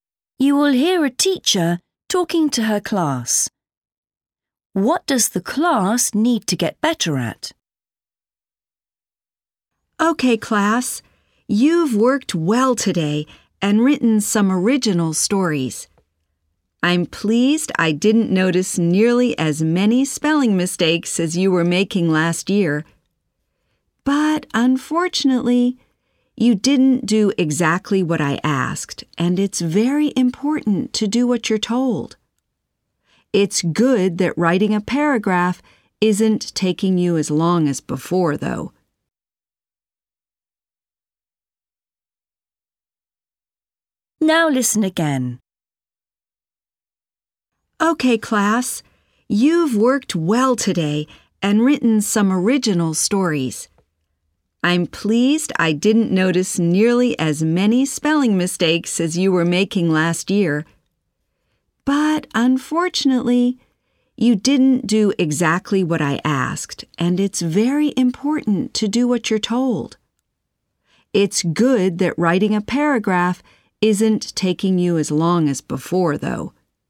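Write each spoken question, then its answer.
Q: What does the class need to get better at?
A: following instructions / doing exactly what they are told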